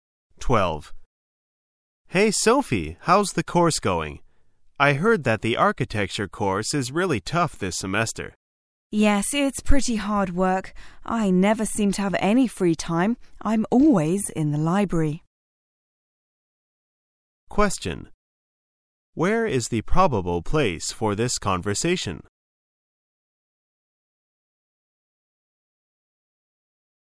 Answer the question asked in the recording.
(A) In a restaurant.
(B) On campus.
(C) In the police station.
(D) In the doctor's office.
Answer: (B) On campus.

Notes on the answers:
此题考查听细节的能力。Equal Pay Act为关键标志词。

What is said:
[解析] M: Hey, Sophie! How's the course going? I heard that the architecture course is really tough this semester. W: Yes, it's pretty hard work. I never seem to have any free time; I'm always in the library. Q: Where is the probable place for this conversation?